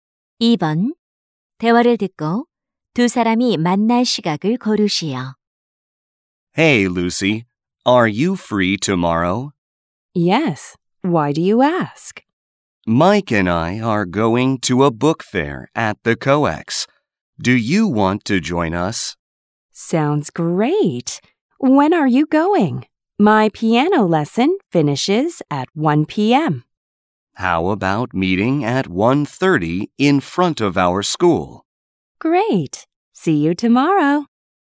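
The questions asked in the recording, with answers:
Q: 대화를 듣고 두 사람이 만날 시각을 고르시오.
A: 1시 30분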